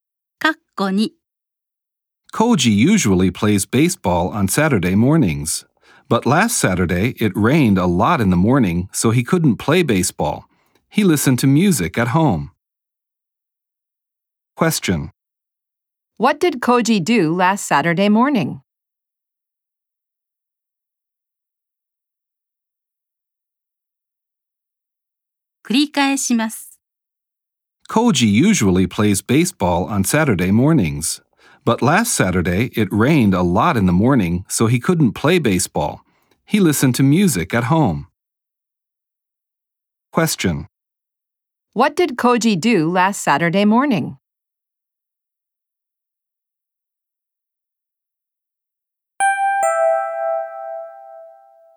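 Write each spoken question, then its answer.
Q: What did Koji do last Saturday morning?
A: 家で音楽を聞いた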